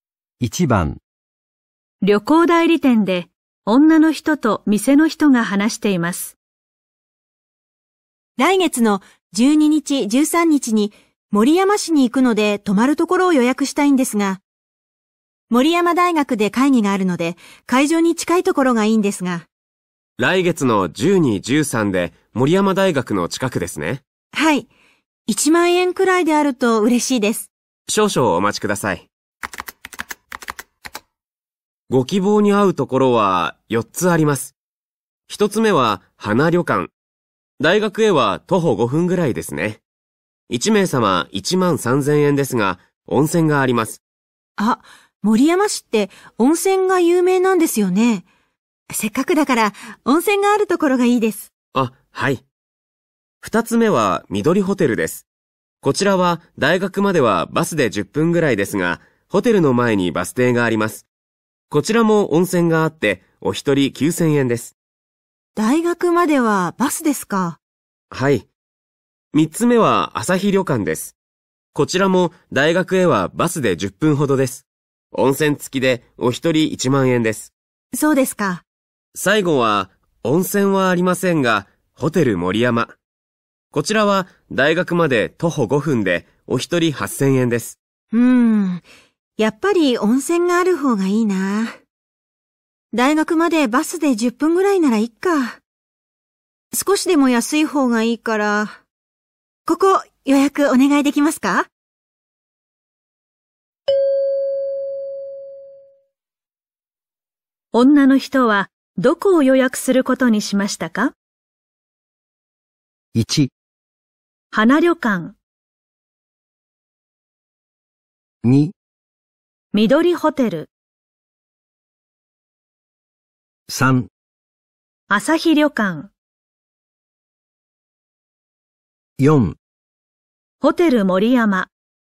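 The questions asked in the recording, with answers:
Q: 女の人はどこを予約することにしましたか?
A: 2: 緑ホテル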